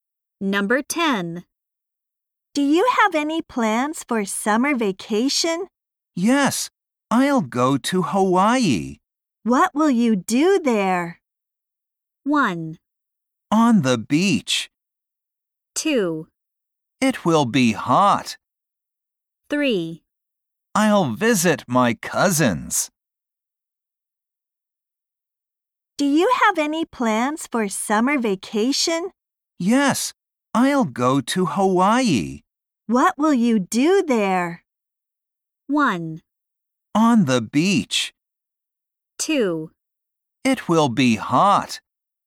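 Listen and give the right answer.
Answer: 3: I'll visit my cousins.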